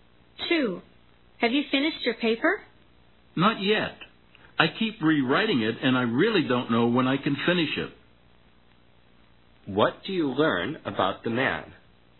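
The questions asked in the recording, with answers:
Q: What do you learn about the man?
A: He hasn't finished his paper; he keeps rewriting it.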